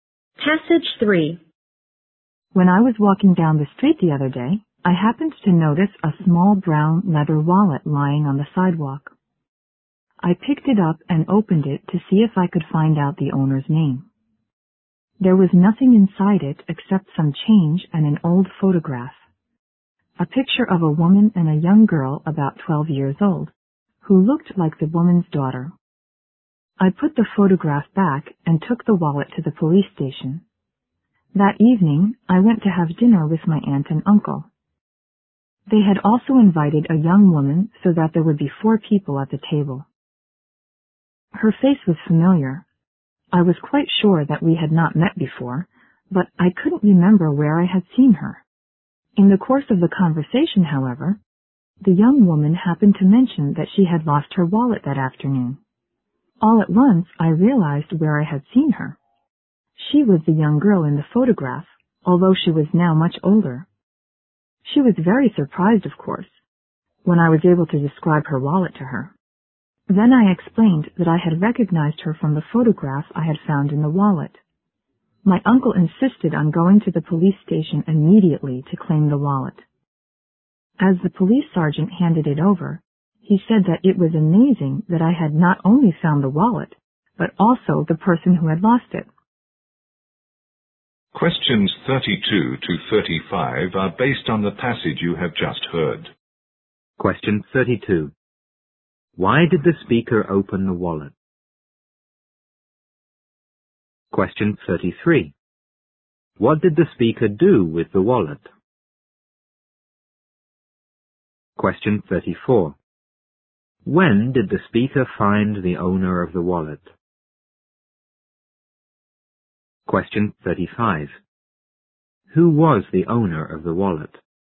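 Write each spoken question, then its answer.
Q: Why did the speaker open the wallet?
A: To find out the owner's name

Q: What did the speaker do with the wallet?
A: Took it to the police station

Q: When did the speaker find the owner of the wallet?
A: That evening at dinner with his aunt and uncle

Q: Who was the owner of the wallet?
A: The young woman at dinner, the girl in the photograph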